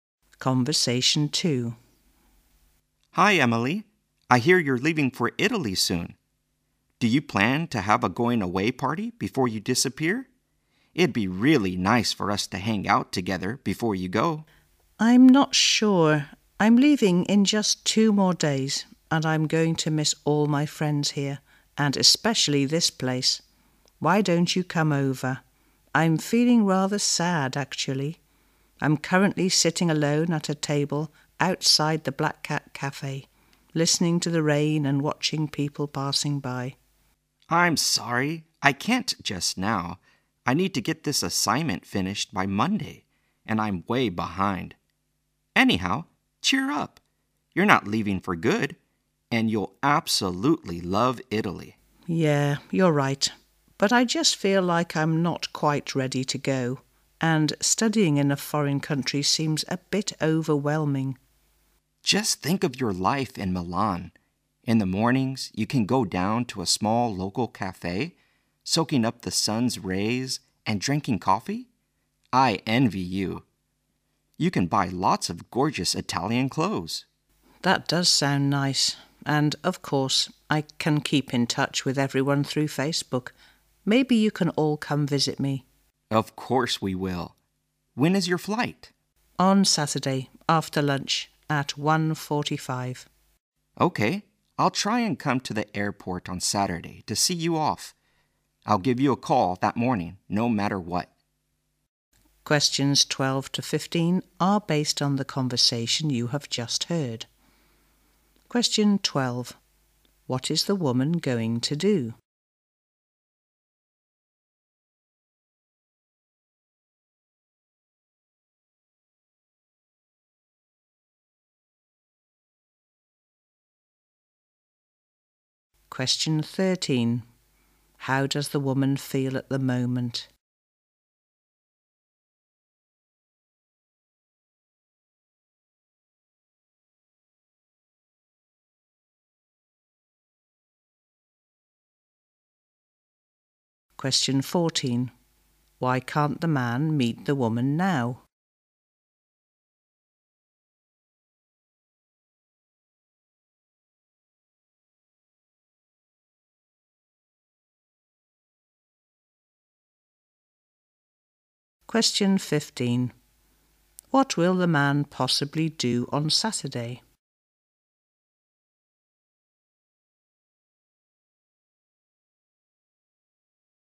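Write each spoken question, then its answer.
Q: What is the woman going to do?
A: Go to study in Italy

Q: How does the woman feel at the moment?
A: Rather sad

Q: Why can't the man meet the woman now?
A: He must finish an assignment by Monday

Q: What will the man possibly do on Saturday?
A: See her off at the airport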